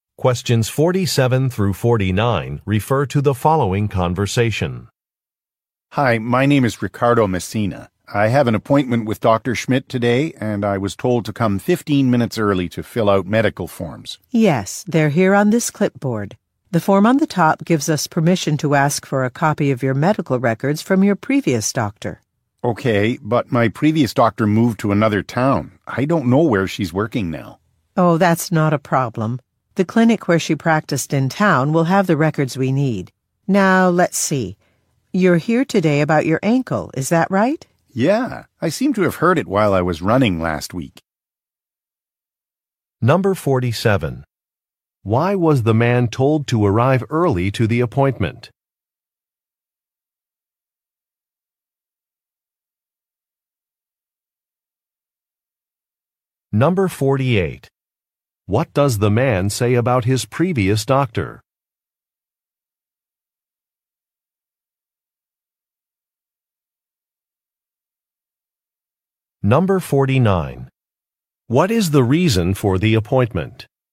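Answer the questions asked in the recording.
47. To fill out medical forms
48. She moved to another town
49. He hurt his ankle while running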